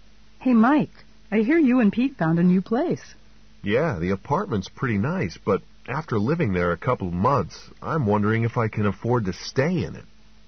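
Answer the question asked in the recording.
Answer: He may not be able to afford the apartment's rent much longer.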